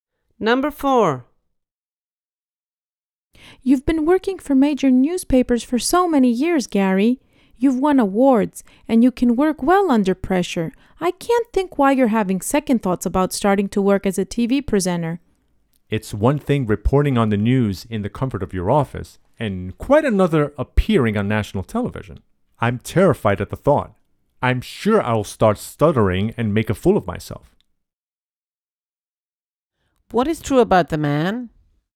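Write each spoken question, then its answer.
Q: What is true about the man?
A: He's afraid of appearing on national television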